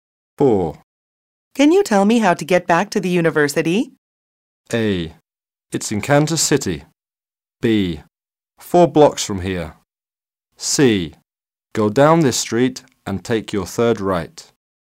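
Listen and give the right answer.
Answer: C: Go down this street and take your third right.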